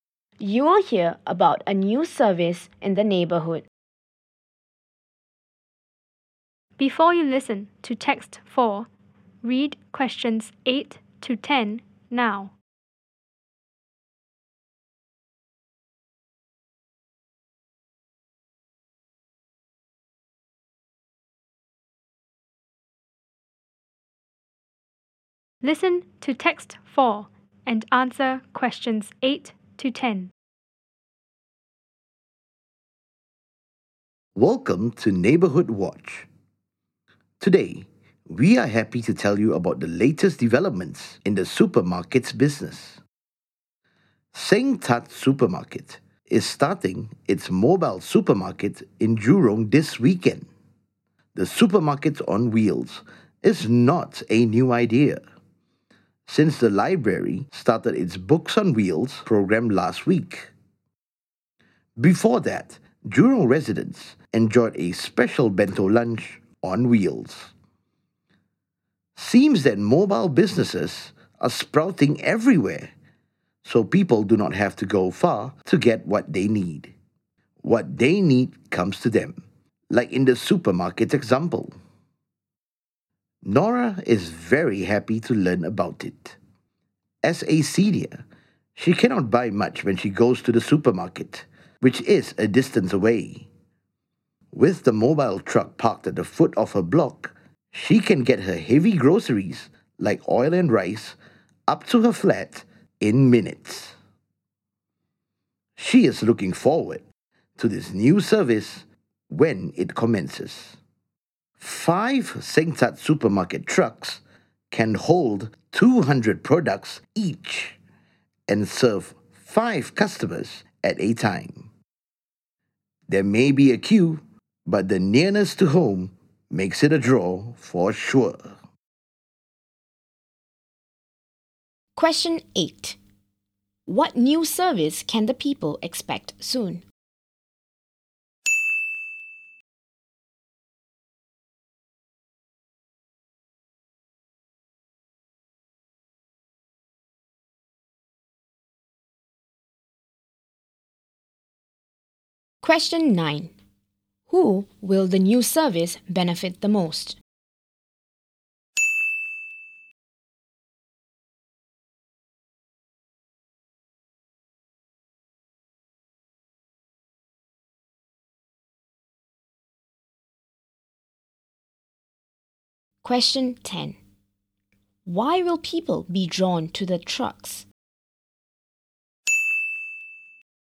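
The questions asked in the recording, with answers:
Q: What new service can the people expect soon?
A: A mobile supermarket (supermarket on wheels)

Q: Why will people be drawn to the trucks?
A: They are near to home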